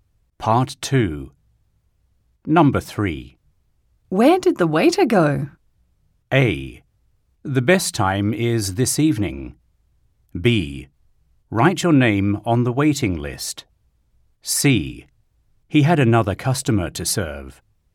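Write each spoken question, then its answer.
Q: Where did the waiter go?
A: C: He had another customer to serve.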